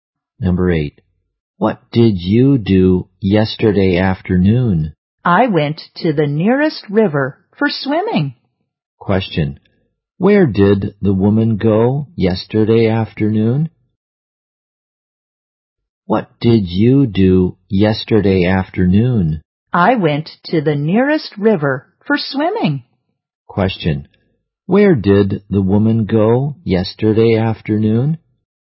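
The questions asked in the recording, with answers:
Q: Where did the woman go yesterday afternoon?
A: To the nearest river.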